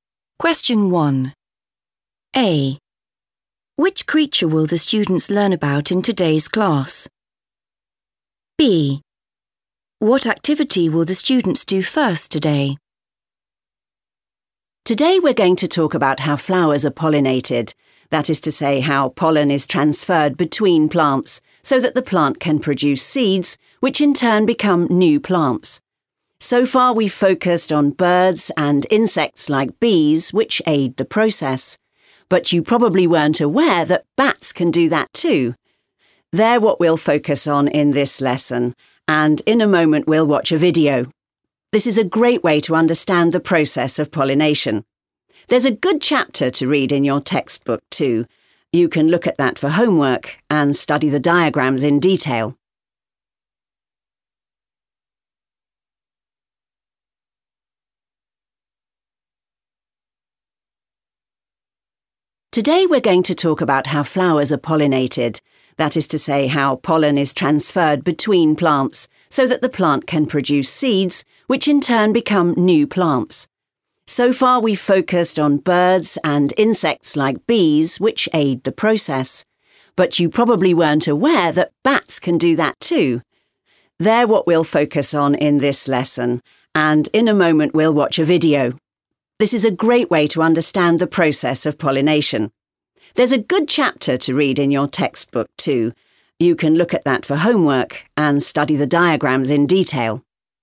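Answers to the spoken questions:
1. bats
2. watch a video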